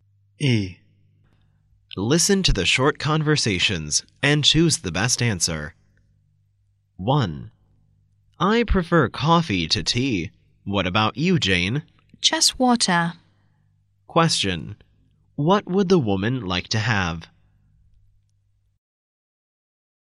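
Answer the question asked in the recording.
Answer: Water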